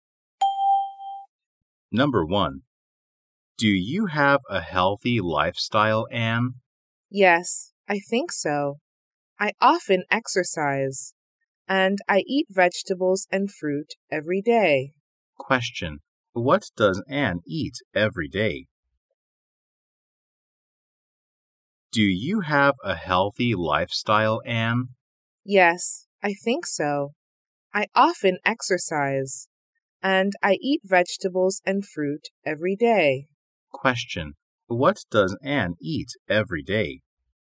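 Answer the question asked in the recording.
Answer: Vegetables and fruit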